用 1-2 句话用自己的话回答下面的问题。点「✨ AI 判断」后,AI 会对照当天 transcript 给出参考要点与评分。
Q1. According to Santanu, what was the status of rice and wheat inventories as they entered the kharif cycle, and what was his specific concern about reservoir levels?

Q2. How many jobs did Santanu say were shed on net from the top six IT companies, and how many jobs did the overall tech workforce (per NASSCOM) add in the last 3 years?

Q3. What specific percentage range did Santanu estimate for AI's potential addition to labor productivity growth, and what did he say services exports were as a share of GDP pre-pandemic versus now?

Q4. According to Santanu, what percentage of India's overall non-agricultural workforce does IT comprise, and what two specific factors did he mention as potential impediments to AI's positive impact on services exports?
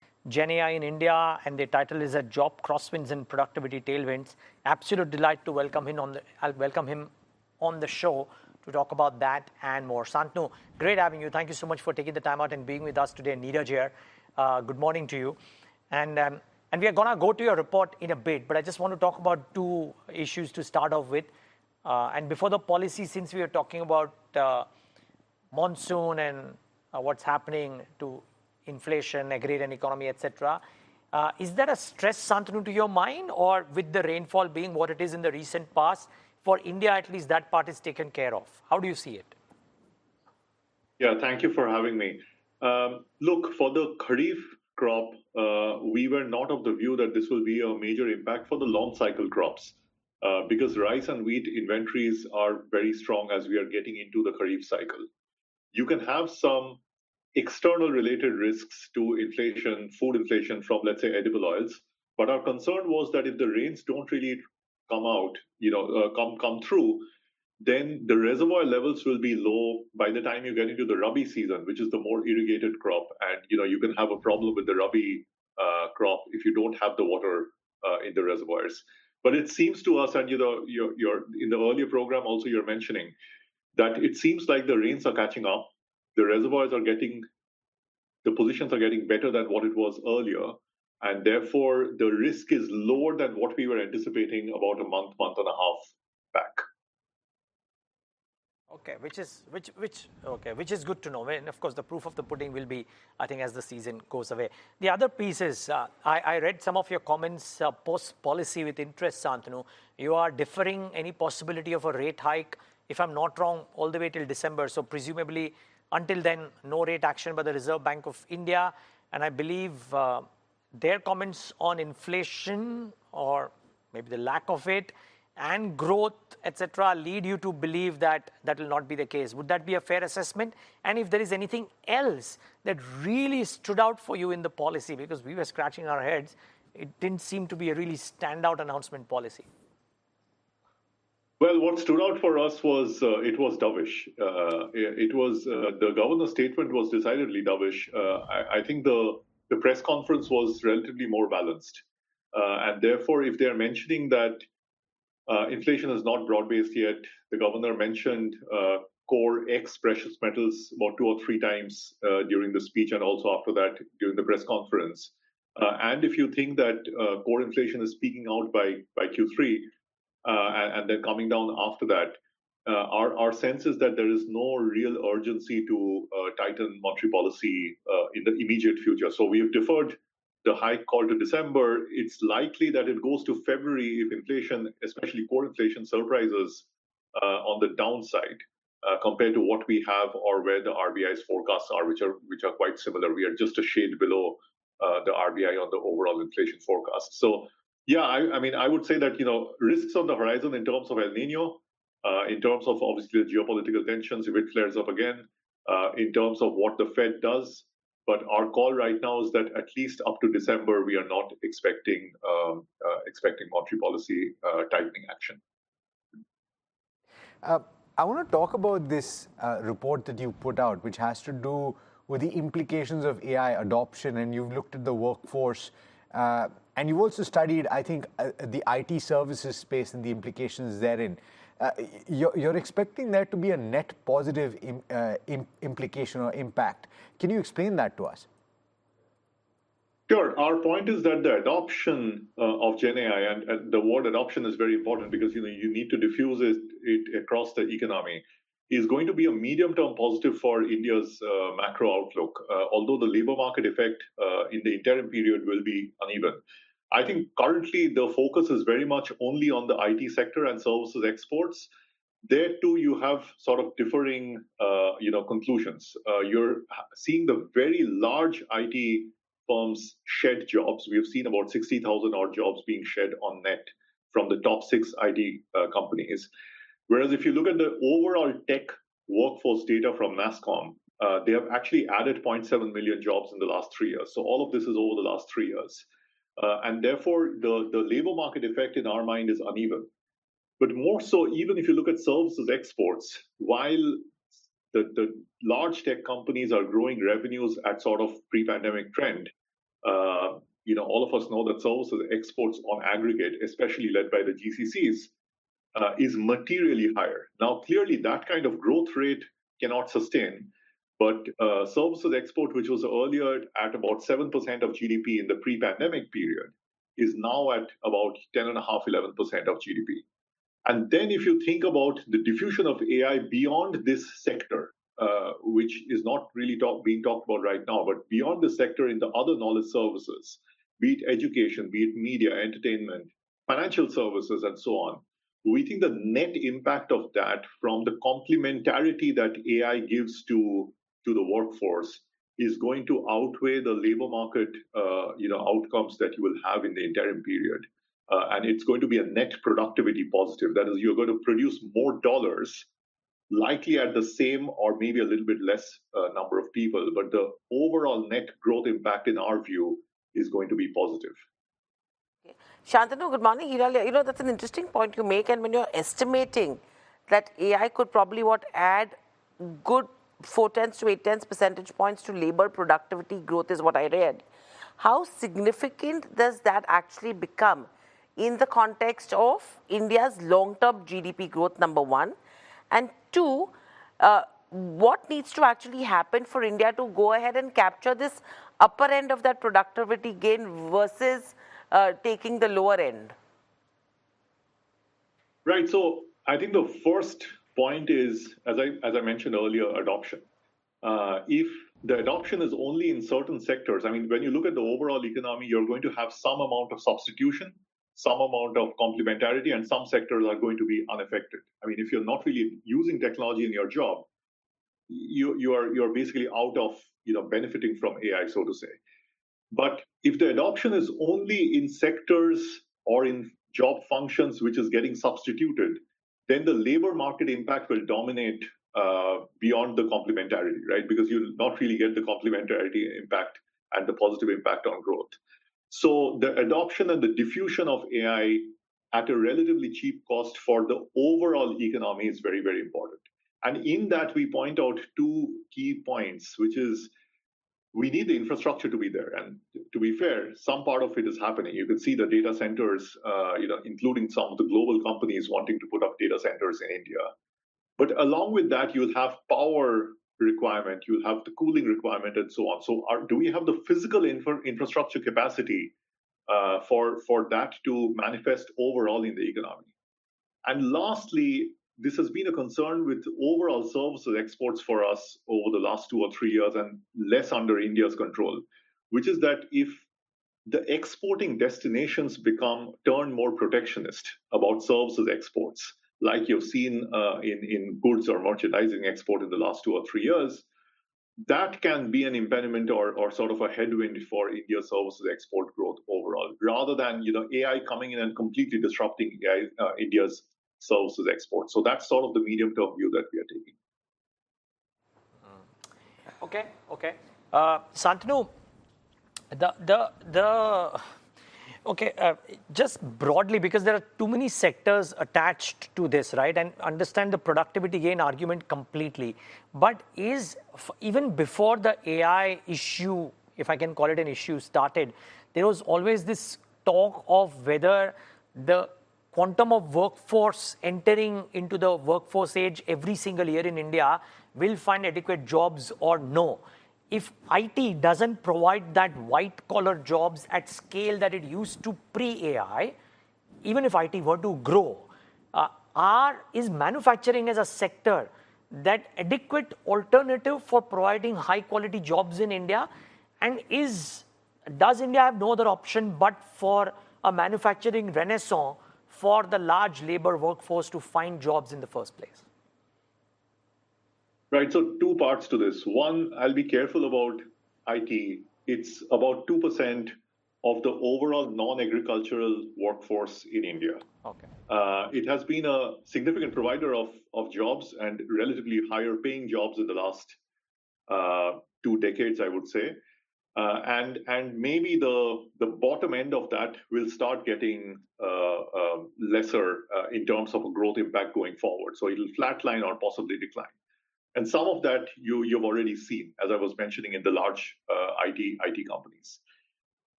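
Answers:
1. Inventories were very strong; his concern was that if the rains did not come through, reservoir levels would be low by the rabi season, hurting the irrigated rabi crop.
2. About 60,000 jobs were shed; the overall tech workforce added 0.7 million jobs.
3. Four tenths to eight tenths of a percentage point; services exports went from about 7% of GDP before the pandemic to about 10.5–11% now.
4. About 2%; the two factors are a lack of physical infrastructure (data centers, power, cooling) and protectionism about services exports in the export destinations.

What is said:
Jenny I in India and the title is a job cross wins and productivity tailwinds absolute delight to welcome him on the welcome him on
The show to talk about that and more something great having you. Thank you so much for taking the time out and being with us today need a chair
Good morning to you and and we are gonna go to your report in a bit
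But I just want to talk about two issues to start off with and before the policy since we are talking about
Monsoon and what's happening to inflation a greater economy, etc
Is that a stress something to your mind or with the rainfall being what it is in the recent past for India?
At least that part is taken care of how do you see it?
Yeah, thank you for having me
Look for the Karif crop
We were not of the view that this will be a major impact for the long cycle crops
Because rice and wheat inventories are very strong as we are getting into the Karif cycle you can have some
External related risks to inflation food inflation from let's say edible oils
But our concern was that if the rains don't really come out, you know come come through
You can have some external related risks to inflation, food inflation from let's say edible oils, but our concern was that if the rains don't really come out, you know, come come through then the reservoir levels will be low by the time you get into the rabi season, which is the more irrigated crop and you know, you can have a problem with the rabi crop if you don't have the water in the reservoirs. 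But it seems to us and you know, you're
you're in the earlier program also you're mentioning that it seems like the rains are catching up. The reservoirs are getting the positions are getting better than what it was earlier and therefore the risk is lower than what we were anticipating about a month month and a half back. half back. >> Okay, which is which which Okay, which is good to know. Well, of course, the proof of the pudding will be I think as the season goes away. The other piece is I I read some of
your comments post policy with interest Santanu. You are deferring any possibility of a rate hike, if I'm not wrong, all the way till December. So presumably until then no rate action by the Reserve Bank of India and I believe and I believe their comments on inflation or maybe the lack of it and growth etc. lead you to believe that that will not be the case. Would that be a fair assessment? 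And if there is anything else that really stood out for you in the policy because
we were scratching our heads, it didn't seem to be a really stand out announcement policy. announcement policy. >> Well, what stood out for us was it was dovish. dovish. It was the governor's statement was decidedly dovish. decidedly dovish. I think the the press conference was relatively more balanced relatively more balanced and therefore if they're mentioning that inflation is not broad-based yet. The governor mentioned governor mentioned core ex precious metals about two or three times during the speech and also after that during the press conference. And
if you think that core inflation is peaking out by by Q3 and they're coming down after that, our our sense is that there is no real urgency to tighten monetary policy in the immediate future. So we've deferred the hike call to December. It's likely that it goes to February if inflation, especially core inflation, surprises on the downside compared to what we have or where the RBI's forecasts are, which are which are quite similar. 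We are just a shade below a shade below the RBI on the
overall inflation forecast. So yeah, I mean I would say that, you know, risks on the horizon in terms of El Nino, in terms of obviously the geopolitical tensions with flares up again, again, in terms of what the Fed does, but our call right now is that at least up to December we are not expecting expecting monetary policy tightening action. action. >> I want to talk about this report that you put out which has to do with the implications of AI adoption and you've looked at the
workforce and you've also studied, I think, the IT services space and the implications therein. therein. You're expecting there to be a net positive in implication or impact. Can you explain that to us? >> Sure. Our point is that the adoption of GenAI and the word adoption is very important because you know, you need to diffuse it it across the economy is going to be a medium-term positive for India's macro outlook. 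Although the labor market effect in the interim period will be uneven. I think currently the
focus is very much only on the IT sector and services exports. There too, you have sort of differing you know, conclusions. You're seeing the very large IT firms shed jobs. We've seen about 60,000 odd jobs being shed on net from the top six IT companies. Whereas if you look at the overall tech workforce data from NASSCOM, they've actually added 0.7 million jobs in the last 3 years. So all of this is over the last 3 years. And therefore the the labor market effect in our mind
is uneven. uneven. But more so even if you look at services exports, while exports, while the the large tech companies are growing revenues at sort of pre-pandemic trend, you know, all of us know that services exports on aggregate especially led by the GCCs the GCCs is materially higher. Now clearly that kind of growth rate cannot sustain. 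But services export which was earlier at about 7% of GDP in the pre-pandemic period is now at about 10 and a half 11% of GDP. of GDP. And then if
you think about the diffusion of AI beyond this sector, which is not really talk being talked about right now, but beyond the sector in the other knowledge services, be it education, be it media, entertainment, financial services and so on. We think the net impact of that from the complementarity that AI gives to to the workforce is going to outweigh the labor market you know, outcomes that you will have in the interim period and it's going to be a net productivity positive. That is you're going to
produce more dollars dollars likely at the same or maybe a little bit less number of people, but the overall net growth impact in our view is going to be positive. to be positive. >> Shantanu, good morning. You know, you know, that's an interesting point you make and when you're estimating that AI could probably what add good 4/10 to 8/10 percentage points to labor productivity growth is what I read. 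How significant does that actually become in the context of India's long-term GDP growth number one? And two,
two, what needs to actually happen for India to go ahead and capture this upper end of that productivity gain versus taking the lower end? >> Right. So, I think the first point is as I as I mentioned earlier, adoption. If the adoption is only in certain sectors, I mean, when you look at the overall economy, you're going to have some amount of substitution, some amount of complementarity, and some sectors are going to be unaffected. I mean, if you're not really using technology in your job, your
job, you you are you're basically out of you know, benefiting from AI, so to say. But, if the adoption is only in sectors or in job functions which is getting substituted, then the labor market impact will dominate impact will dominate beyond the complementarity, right? Because you're not really get the complementarity impact and the positive impact on growth. 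impact on growth. So, the adoption and the diffusion of AI at a relatively cheap cost for the overall economy is very, very important. And in that, we point out
two key points, which is points, which is we need the infrastructure to be there. And to be fair, some part of it is happening. You can see the data centers, you know, including some of the global companies wanting to put up data centers in India. in India. But, along with that, you'll have power requirement, you'll have the cooling requirement, and so on. So, are Do we have the physical infra- infrastructure capacity uh for for that to manifest overall in the economy? And lastly, this has been
a concern with overall services exports for us over the last two or three years, and less under India's control, which is that if the exporting destinations become turn more protectionist about services exports, like you've seen uh in in goods or merchandising export in the last two or three years, three years, that can be an impediment or or sort of a headwind for India's services export growth overall, rather than, you know, AI coming in and completely disrupting uh India's services export.
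Uh in, in goods or merchandising export in the last two or three years that can be an impediment or, or sort of a headwind for India services export growth overall rather than, you know, AI coming in and completely disrupting AI India's services export.
So that's sort of the medium term view that we are taking.
Okay, okay.
Uh, Santanu, the, the, the, okay, uh, just broadly because there are too many sectors attached to this, right?
And understand the productivity gain argument completely, but is even before the AI issue, if I can call it an issue started, there was always this talk of whether the quantum of workforce entering into the workforce age every single year in India will find adequate jobs or no.
If it doesn't provide that white collar jobs at scale that it used to pre AI, even if it were to grow.
Are is manufacturing as a sector that adequate alternative for providing high quality jobs in India?
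And is, does India have no other option but for a manufacturing renaissance for the large labor workforce to find jobs in the first place, right?
So two parts to this.
One, I'll be careful about it.
It's about 2% of the overall non agricultural workforce in India, okay?
Uh, it has been a significant provider of, of jobs and relatively higher paying jobs in the last, uh, two decades, I would say.
Uh, and, and maybe the, the bottom end of that will start getting, uh, uh, lesser, uh, in terms of a growth impact going forward.
So it'll flatline or possibly decline and some of that you, you've already seen, as I was mentioning in the large it, it companies.

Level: CEFRB2-C1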